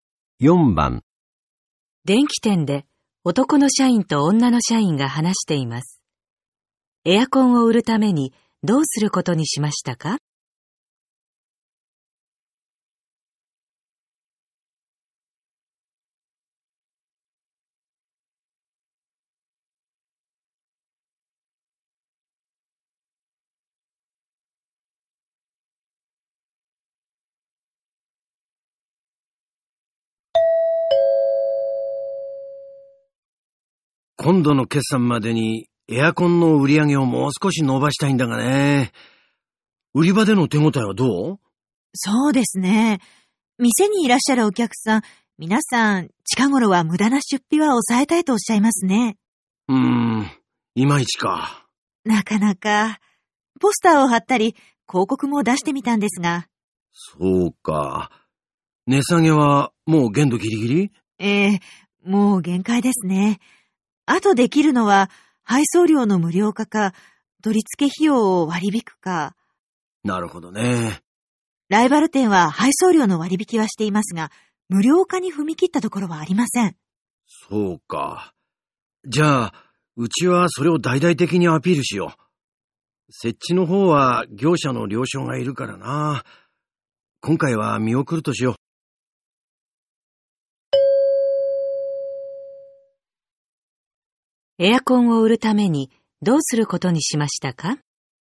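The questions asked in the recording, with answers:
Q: エアコンを売るためにどうすることにしましたか?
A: 配送料を無料にしてアピールする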